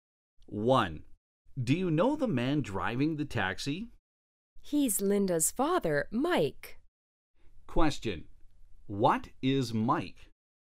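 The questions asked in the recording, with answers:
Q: What is Mike?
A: A taxi driver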